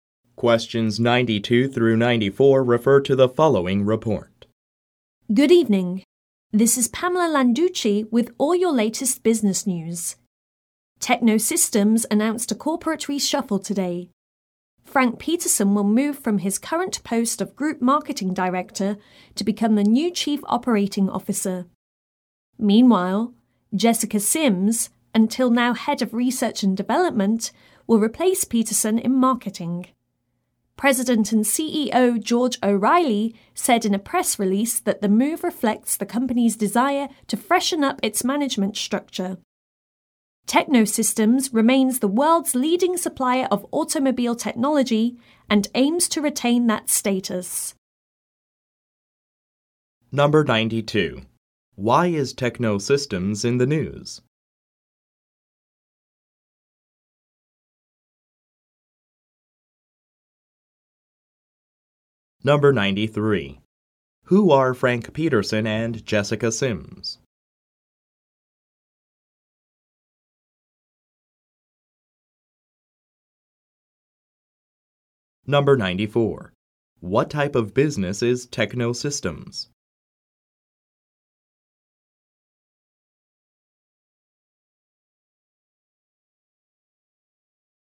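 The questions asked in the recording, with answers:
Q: Why is Techno Systems in the news?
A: It announced a corporate reshuffle

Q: Who are Frank Peterson and Jessica Sims?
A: Techno Systems executives changing positions

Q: What type of business is Techno Systems?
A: A supplier of automobile technology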